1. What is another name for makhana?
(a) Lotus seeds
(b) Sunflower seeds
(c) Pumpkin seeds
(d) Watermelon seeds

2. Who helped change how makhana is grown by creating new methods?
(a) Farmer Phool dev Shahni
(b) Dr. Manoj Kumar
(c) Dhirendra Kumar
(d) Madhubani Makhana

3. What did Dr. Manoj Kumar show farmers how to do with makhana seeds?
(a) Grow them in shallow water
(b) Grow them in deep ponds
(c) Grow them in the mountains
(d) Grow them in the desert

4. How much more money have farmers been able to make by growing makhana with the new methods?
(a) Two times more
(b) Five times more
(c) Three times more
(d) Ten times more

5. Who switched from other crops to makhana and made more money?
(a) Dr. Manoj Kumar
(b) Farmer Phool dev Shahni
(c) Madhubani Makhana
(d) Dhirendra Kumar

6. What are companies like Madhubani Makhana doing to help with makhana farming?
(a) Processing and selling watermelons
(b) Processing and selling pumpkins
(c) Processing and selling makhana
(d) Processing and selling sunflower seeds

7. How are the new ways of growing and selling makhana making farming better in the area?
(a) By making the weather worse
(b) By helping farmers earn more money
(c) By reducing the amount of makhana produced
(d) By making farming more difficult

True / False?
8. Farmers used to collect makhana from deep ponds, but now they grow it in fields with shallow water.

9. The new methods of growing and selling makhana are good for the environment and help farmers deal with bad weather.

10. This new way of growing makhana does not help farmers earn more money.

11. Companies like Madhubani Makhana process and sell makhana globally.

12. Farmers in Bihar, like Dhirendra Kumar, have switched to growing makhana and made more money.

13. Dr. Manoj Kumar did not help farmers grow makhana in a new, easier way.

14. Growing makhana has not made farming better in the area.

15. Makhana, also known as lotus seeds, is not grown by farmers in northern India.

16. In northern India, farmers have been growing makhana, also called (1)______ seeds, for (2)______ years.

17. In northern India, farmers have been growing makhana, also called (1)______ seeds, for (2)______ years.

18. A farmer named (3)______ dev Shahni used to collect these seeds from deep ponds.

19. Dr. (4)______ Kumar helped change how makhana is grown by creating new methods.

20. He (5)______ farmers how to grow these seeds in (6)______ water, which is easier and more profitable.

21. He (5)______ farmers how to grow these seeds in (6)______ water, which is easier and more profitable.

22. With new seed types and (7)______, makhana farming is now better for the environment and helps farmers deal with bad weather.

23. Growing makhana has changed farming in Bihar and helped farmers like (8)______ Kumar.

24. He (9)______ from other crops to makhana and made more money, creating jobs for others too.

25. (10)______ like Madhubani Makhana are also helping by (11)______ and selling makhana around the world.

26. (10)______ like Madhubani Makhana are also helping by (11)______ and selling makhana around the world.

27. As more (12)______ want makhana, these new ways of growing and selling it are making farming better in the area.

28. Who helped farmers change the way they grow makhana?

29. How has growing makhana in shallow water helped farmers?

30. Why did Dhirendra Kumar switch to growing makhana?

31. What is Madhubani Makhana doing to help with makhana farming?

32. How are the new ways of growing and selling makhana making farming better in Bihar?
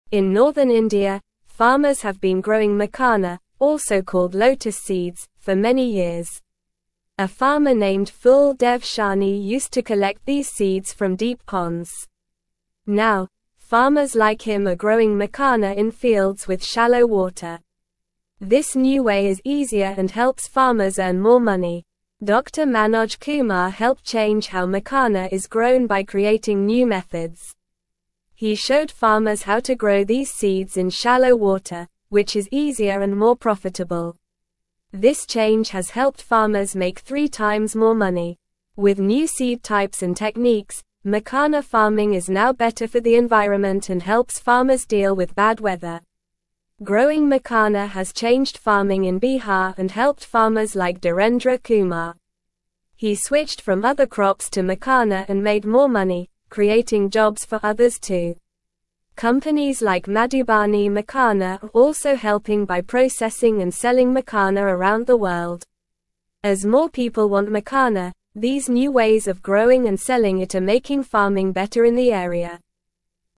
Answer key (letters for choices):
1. a
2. b
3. a
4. c
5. d
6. c
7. b
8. True
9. True
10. False
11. True
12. True
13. False
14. False
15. False
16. lotus
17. many
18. Phool
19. Manoj
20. showed
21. shallow
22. techniques
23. Dhirendra
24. switched
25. Companies
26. processing
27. people
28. Dr. Manoj Kumar helped farmers change how they grow makhana.
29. It has made growing makhana easier and more profitable for farmers.
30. He switched because he could make more money growing makhana.
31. They are processing and selling makhana around the world.
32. The new ways are making farming better by helping farmers earn more money and creating jobs for others.

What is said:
In northern India, farmers have been growing makhana, also called lotus seeds, for many years. A farmer named Phool dev Shahni used to collect these seeds from deep ponds. Now, farmers like him are growing makhana in fields with shallow water. This new way is easier and helps farmers earn more money.
Dr. Manoj Kumar helped change how makhana is grown by creating new methods. He showed farmers how to grow these seeds in shallow water, which is easier and more profitable. This change has helped farmers make three times more money. With new seed types and techniques, makhana farming is now better for the environment and helps farmers deal with bad weather.
Growing makhana has changed farming in Bihar and helped farmers like Dhirendra Kumar. He switched from other crops to makhana and made more money, creating jobs for others too. Companies like Madhubani Makhana are also helping by processing and selling makhana around the world. As more people want makhana, these new ways of growing and selling it are making farming better in the area.

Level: Level 2